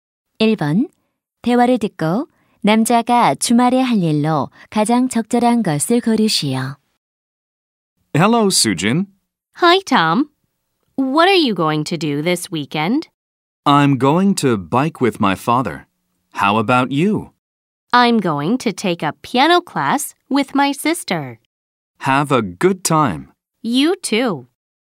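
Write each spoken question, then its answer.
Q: 대화를 듣고 남자가 주말에 할 일로 가장 적절한 것을 고르시오.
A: 아버지와 자전거 타기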